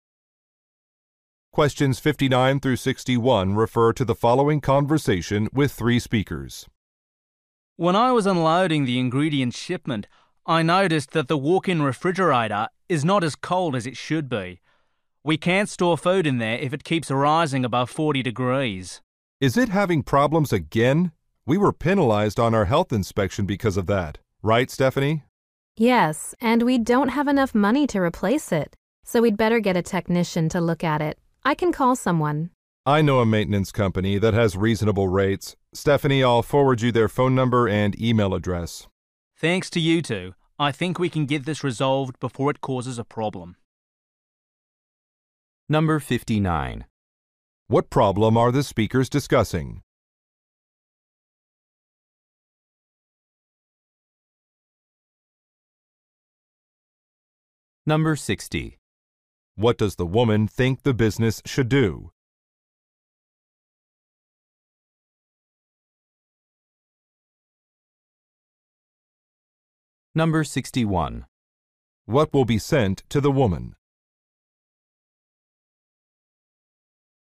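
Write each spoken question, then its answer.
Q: What problem are the speakers discussing?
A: The walk-in refrigerator is not cold enough

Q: What does the woman think the business should do?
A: Get a technician to look at it

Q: What will be sent to the woman?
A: A maintenance company's contact information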